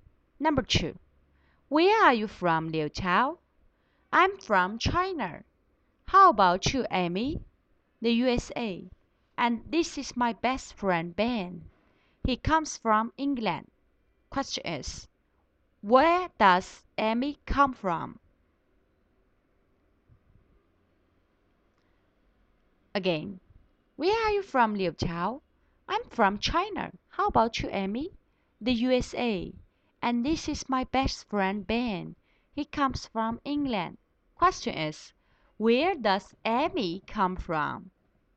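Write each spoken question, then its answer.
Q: where does Amy come from?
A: The USA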